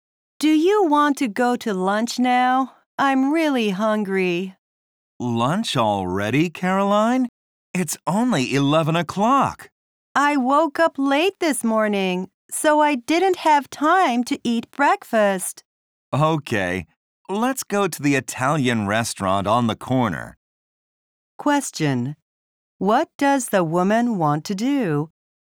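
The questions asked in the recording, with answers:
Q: What does the woman want to do?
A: Go to lunch now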